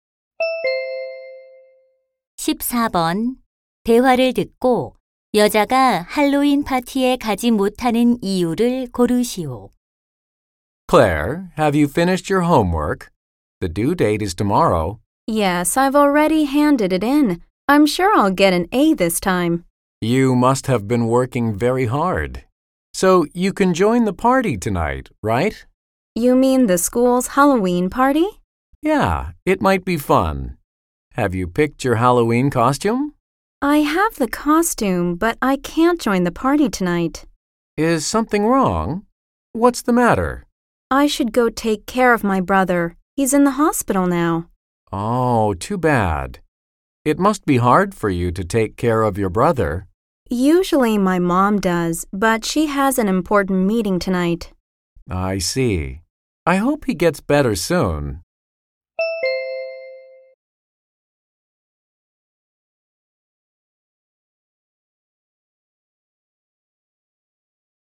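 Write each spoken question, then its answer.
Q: 대화를 듣고 여자가 할로윈 파티에 가지 못하는 이유를 고르시오.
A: 입원한 남동생을 돌봐야 해서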